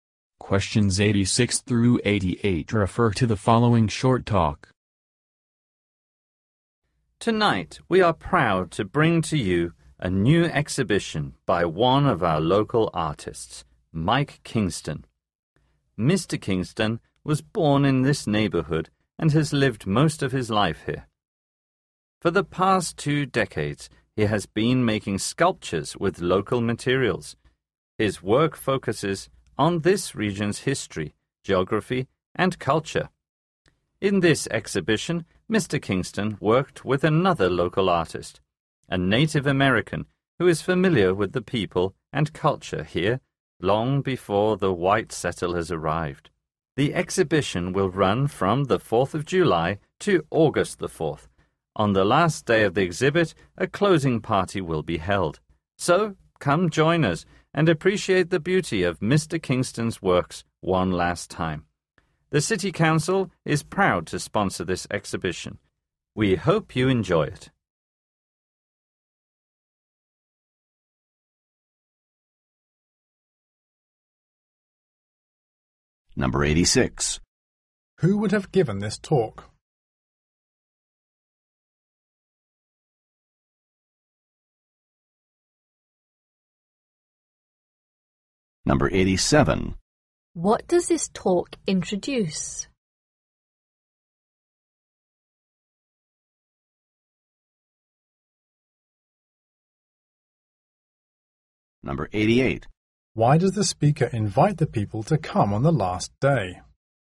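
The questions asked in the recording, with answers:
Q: What does this talk introduce?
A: A new exhibition by local artist Mike Kingston

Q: Why does the speaker invite the people to come on the last day?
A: A closing party will be held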